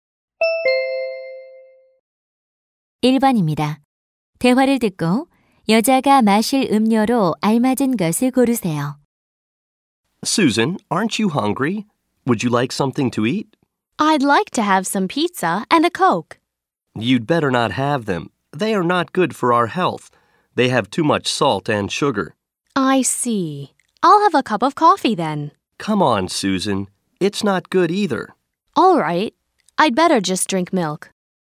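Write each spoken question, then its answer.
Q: 대화를 듣고 여자가 마실 음료로 알맞은 것을 고르세요.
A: 우유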